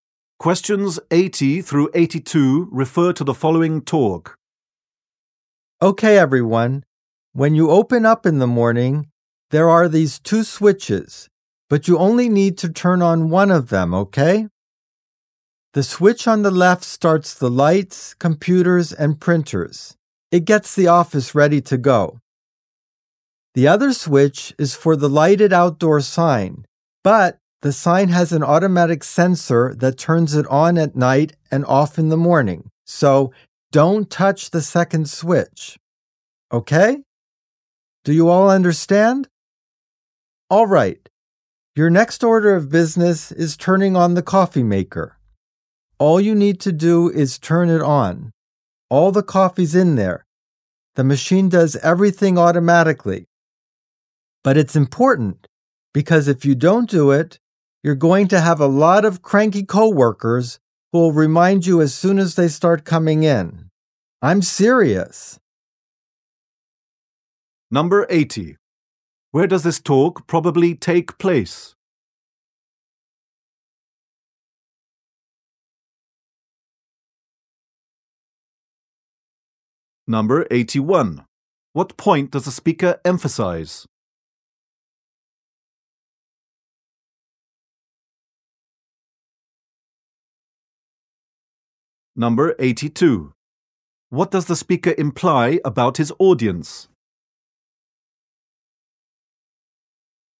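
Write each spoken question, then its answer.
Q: Where does this talk probably take place?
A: In an office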